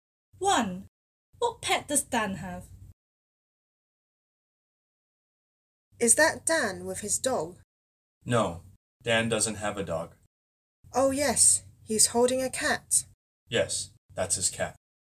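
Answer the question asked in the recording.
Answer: a cat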